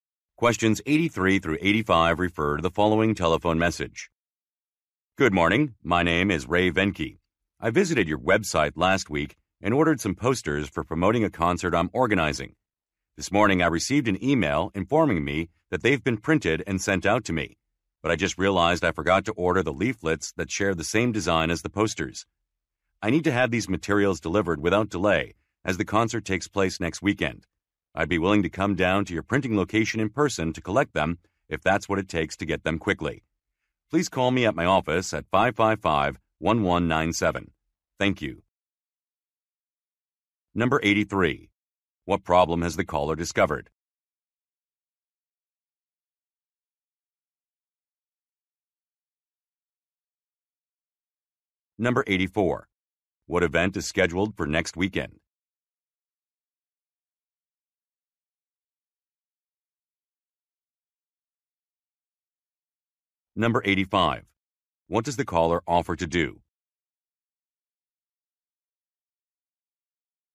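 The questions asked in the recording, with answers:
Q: What problem has the caller discovered?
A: He forgot to order leaflets

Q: What event is scheduled for next weekend?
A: A concert

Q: What does the caller offer to do?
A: Pick up the materials in person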